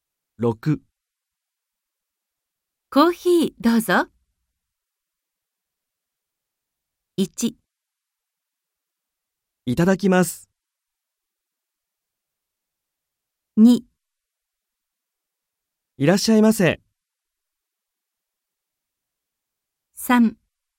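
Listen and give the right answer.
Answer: 1: いただきます。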